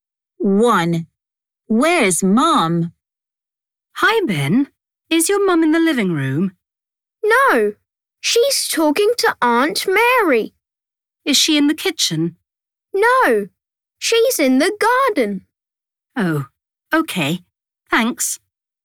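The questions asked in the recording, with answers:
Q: Where's Mum?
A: In the garden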